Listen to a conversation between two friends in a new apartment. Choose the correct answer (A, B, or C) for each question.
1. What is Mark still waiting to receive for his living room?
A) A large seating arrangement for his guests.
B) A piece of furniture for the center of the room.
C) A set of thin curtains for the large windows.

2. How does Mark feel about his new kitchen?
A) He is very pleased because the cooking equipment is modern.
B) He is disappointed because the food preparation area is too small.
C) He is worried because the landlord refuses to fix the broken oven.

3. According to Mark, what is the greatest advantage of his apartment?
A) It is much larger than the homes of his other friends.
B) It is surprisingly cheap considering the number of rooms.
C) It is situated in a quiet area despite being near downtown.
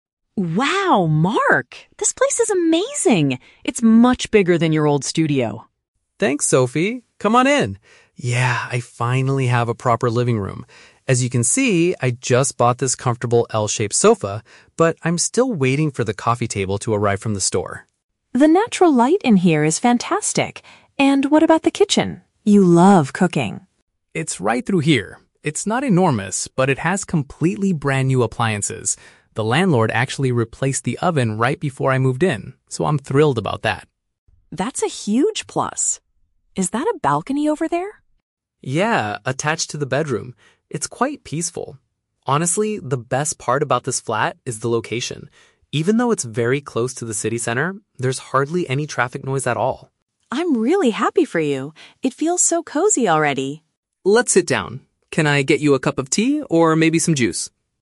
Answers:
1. B
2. A
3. C

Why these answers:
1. Mark says he is still waiting for the "coffee table" to arrive. Option B is a paraphrase of a coffee table (a piece of furniture usually placed in the center of a living room). Option A is the Trap: He already bought the "L-shaped sofa" (large seating arrangement), he is not waiting for it. Option C is plausible for a room with "fantastic natural light", but it is never mentioned.
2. Mark says he is "thrilled" (very pleased) because the kitchen has "brand-new appliances" (modern cooking equipment). Option B is the Trap: He admits the kitchen is "not enormous" (not very big), but he is definitely not disappointed. Option C is also a Trap: The landlord replaced the oven, not refused to fix it.
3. Mark says the best part is that "even though it's very close to the city center, there's hardly any traffic noise". Option C paraphrases this perfectly (close to city center = near downtown; hardly any traffic noise = quiet area). Option A is the Trap: Sophie says it is bigger than his "old studio", not bigger than his friends' homes. Option B is not mentioned in the audio.

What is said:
Sophie: Wow, Mark! This place is amazing. It's much bigger than your old studio.
Mark: Thanks, Sophie! Come on in. Yeah, I finally have a proper living room. As you can see, I just bought this comfortable L-shaped sofa, but I'm still waiting for the coffee table to arrive from the store.
Sophie: The natural light in here is fantastic. And what about the kitchen? You love cooking.
Mark: It's right through here. It's not enormous, but it has completely brand-new appliances. The landlord actually replaced the oven right before I moved in, so I'm thrilled about that.
Sophie: That's a huge plus. Is that a balcony over there?
Mark: Yeah, attached to the bedroom. It's quite peaceful. Honestly, the best part about this flat is the location. Even though it's very close to the city center, there's hardly any traffic noise at all.
Sophie: I'm really happy for you. It feels so cozy already.

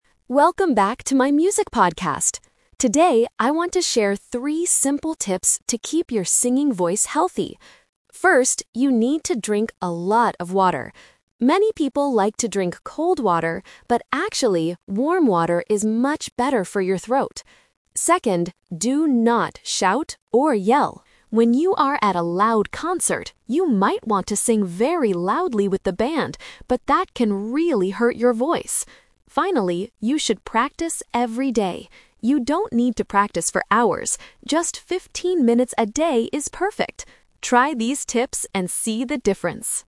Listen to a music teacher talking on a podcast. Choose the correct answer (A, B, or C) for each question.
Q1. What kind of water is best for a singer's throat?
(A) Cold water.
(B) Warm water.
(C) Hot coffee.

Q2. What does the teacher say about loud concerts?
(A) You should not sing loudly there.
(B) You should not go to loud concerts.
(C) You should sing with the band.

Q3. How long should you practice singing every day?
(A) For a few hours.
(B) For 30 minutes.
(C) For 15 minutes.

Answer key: 1B, 2A, 3C

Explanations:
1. The teacher clearly says, "...warm water is much better for your throat." Option (A) is the A2 Twist/Trap because he mentions that "many people like to drink cold water", but he advises against it. Option (C) is a plausible drink but is never mentioned in the audio.
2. The main tip is "do not shout or yell." He explains that singing very loudly at a concert "can really hurt your voice." Option (B) is a trap; he doesn't tell you to stop going to concerts, just not to yell when you are there. Option (C) is exactly what he tells you NOT to do.
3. The teacher says, "Just 15 minutes a day is perfect." Option (A) is the A2 Trap because he uses the word "hours" in a negative sentence ("You don't need to practice for hours"). Option (B) is an unmentioned distractor.

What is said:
Podcaster: Welcome back to my music podcast! Today, I want to share three simple tips to keep your singing voice healthy. First, you need to drink a lot of water. Many people like to drink cold water, but actually, warm water is much better for your throat. Second, do not shout or yell. When you are at a loud concert, you might want to sing very loudly with the band, but that can really hurt your voice. Finally, you should practice every day. You don't need to practice for hours. Just 15 minutes a day is perfect. Try these tips and see the difference!

